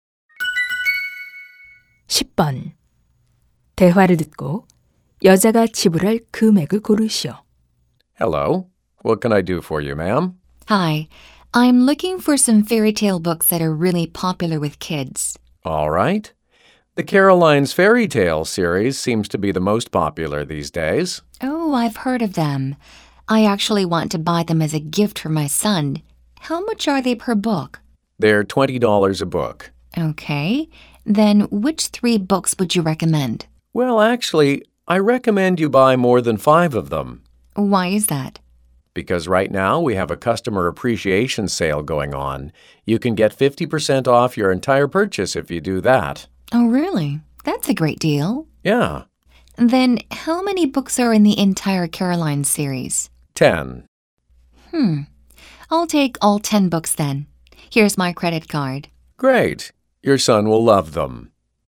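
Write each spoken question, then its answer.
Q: 대화를 듣고 여자가 지불할 금액을 고르시오.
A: $100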